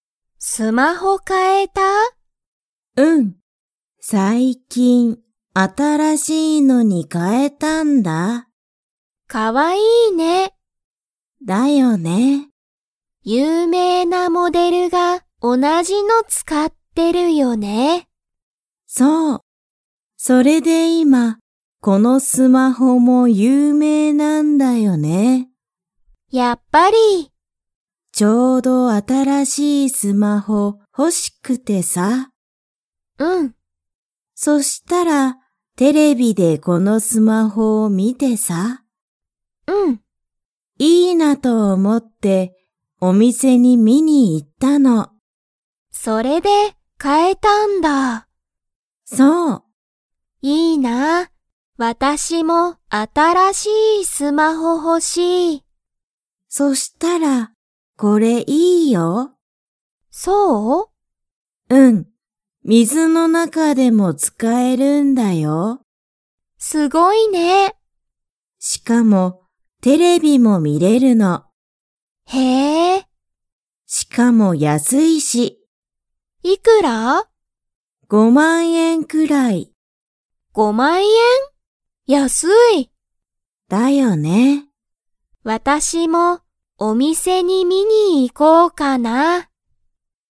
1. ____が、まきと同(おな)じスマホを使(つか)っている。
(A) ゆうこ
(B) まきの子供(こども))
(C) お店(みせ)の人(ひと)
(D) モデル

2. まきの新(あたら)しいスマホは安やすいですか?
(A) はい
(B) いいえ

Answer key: 1D, 2A

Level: Level 2

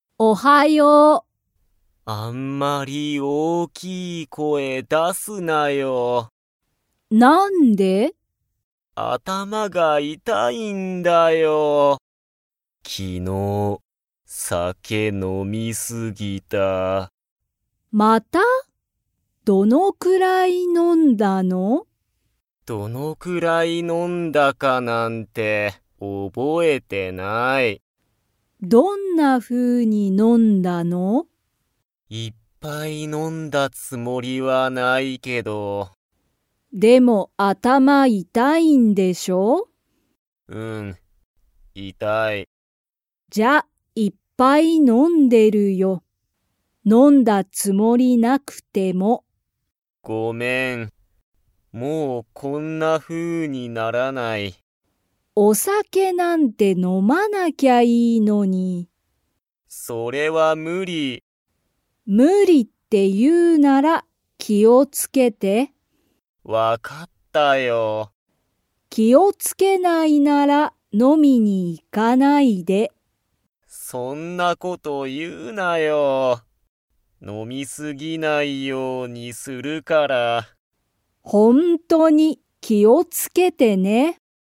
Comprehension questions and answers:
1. ユウジは体からだのどこが痛いたいですか?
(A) 頭あたま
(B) 肩かた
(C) 手て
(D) 足あし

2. ユウジは、お酒さけを飲のみ過すぎないように 。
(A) する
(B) しない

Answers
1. A
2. A

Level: Level 3

